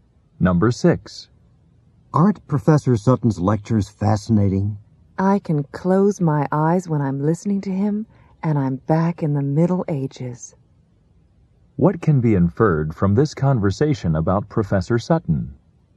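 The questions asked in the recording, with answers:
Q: What can be inferred from this conversation about Professor Sutton?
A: His lectures on the Middle Ages are vivid and interesting.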